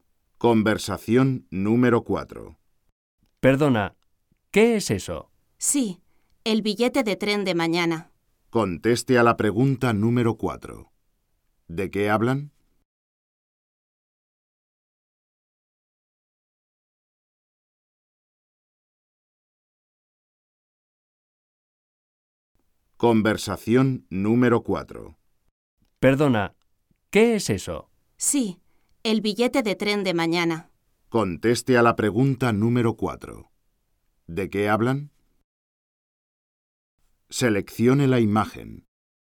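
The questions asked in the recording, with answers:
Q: ¿De qué hablan?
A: Del billete de tren de mañana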